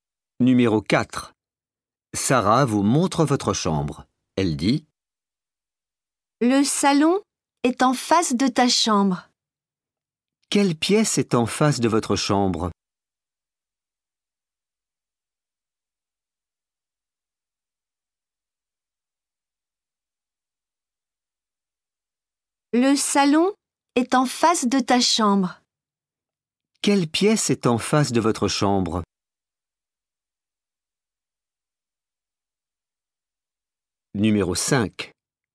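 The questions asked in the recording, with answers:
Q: Quelle pièce est en face de votre chambre?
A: Le salon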